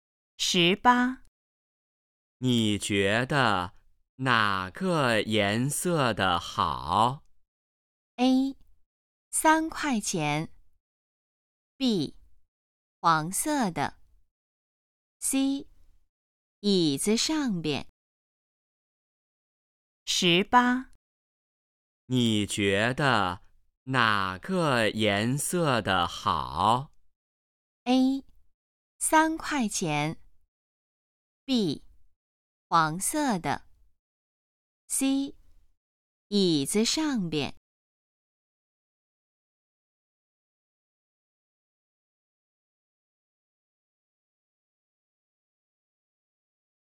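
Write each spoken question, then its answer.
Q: 你觉得哪个颜色的好?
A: B: 黄色的。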